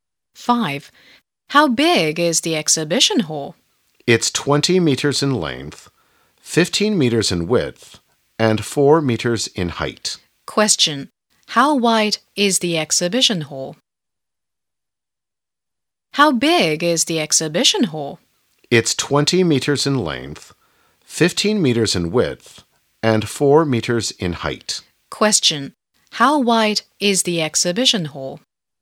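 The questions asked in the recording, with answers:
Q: How wide is the exhibition hall?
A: 15 meters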